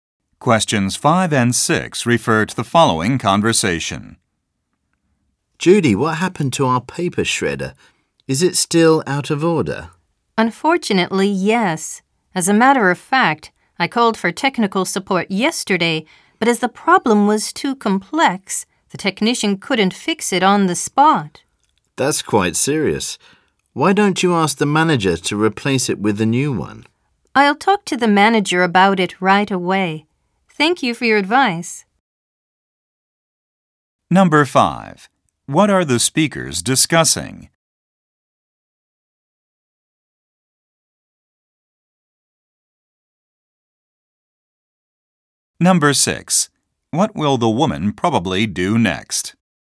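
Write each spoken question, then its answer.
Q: What are the speakers discussing?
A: A broken paper shredder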